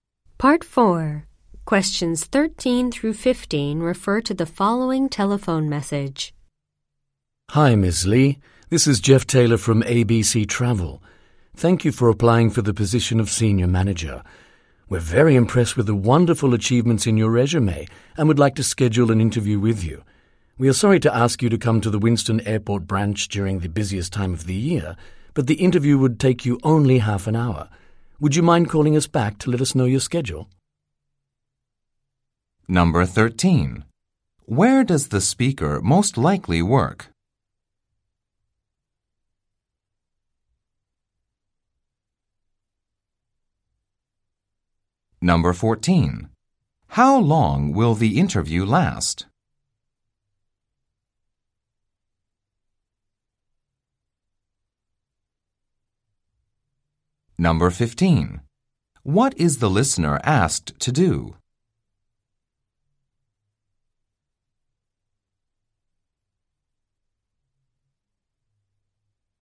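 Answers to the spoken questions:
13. At a travel agency (ABC Travel)
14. Half an hour
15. Call back to give her schedule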